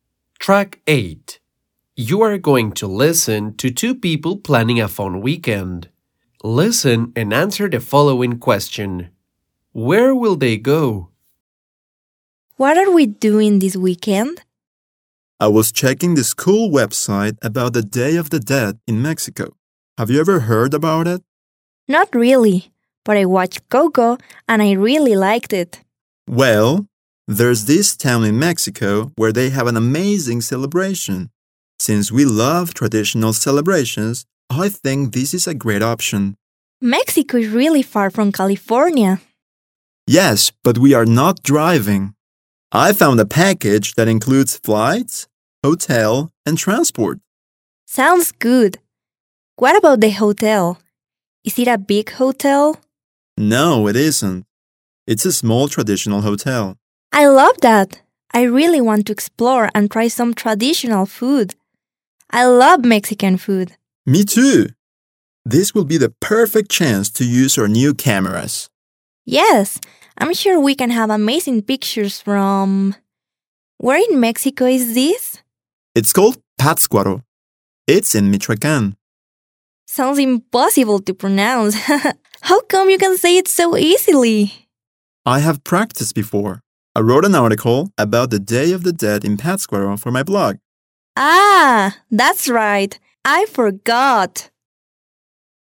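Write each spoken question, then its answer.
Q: Where will they go?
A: To Pátzcuaro, Michoacán, in Mexico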